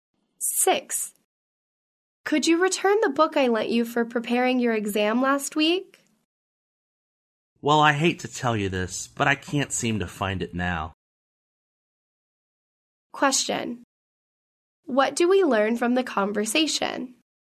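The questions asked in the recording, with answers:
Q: What do we learn from the conversation?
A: The man has lost the book he borrowed.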